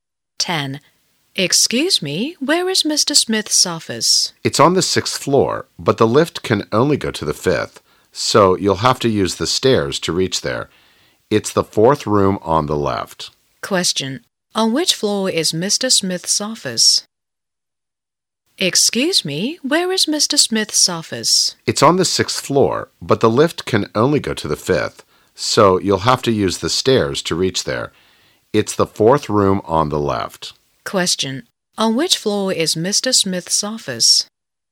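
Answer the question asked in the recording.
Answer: On the 6th floor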